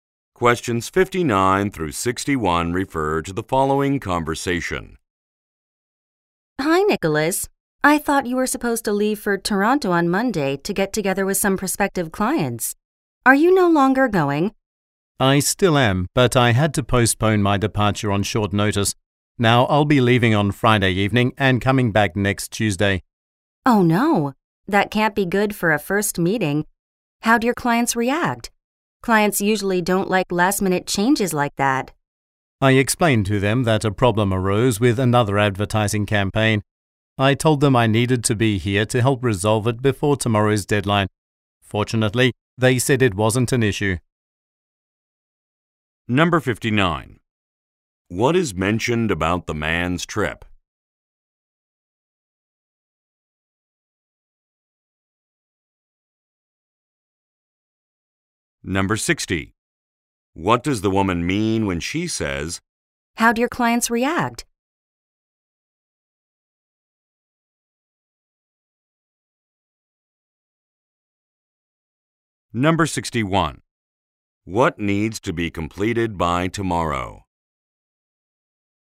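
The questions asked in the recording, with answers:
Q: What is mentioned about the man's trip?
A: It was postponed

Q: "How'd your clients react?"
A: She worries the clients were upset

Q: What needs to be completed by tomorrow?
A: Fixing a problem with an advertising campaign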